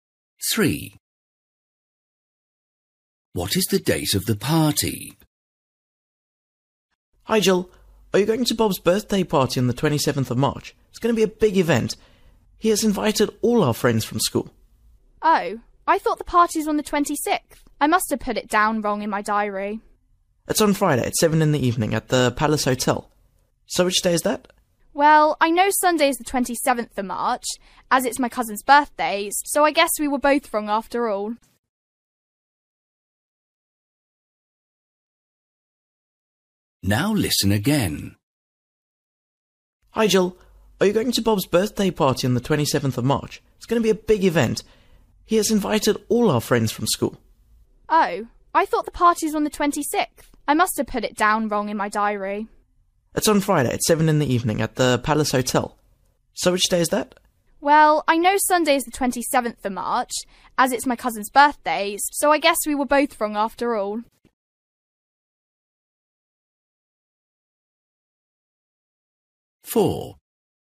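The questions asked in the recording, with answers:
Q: What is the date of the party?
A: Friday, 25th March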